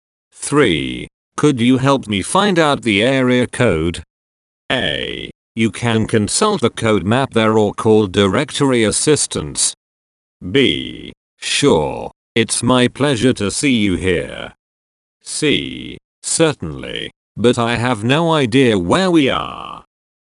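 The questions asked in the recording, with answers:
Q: Could you help me find out the area code?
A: A: You can consult the code map there or call directory assistance.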